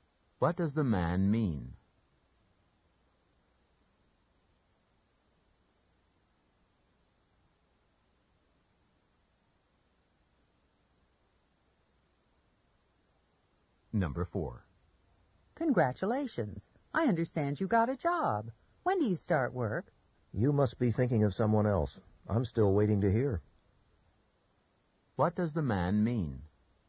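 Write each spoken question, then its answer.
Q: What does the man mean?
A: He hasn't gotten a job yet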